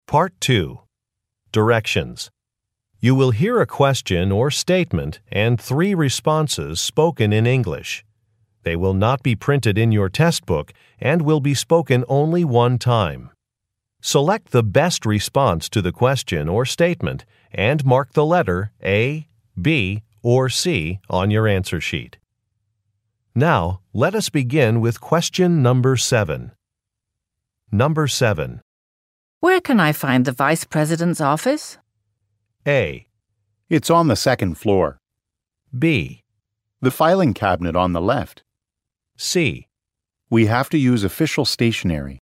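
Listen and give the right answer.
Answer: It's on the second floor.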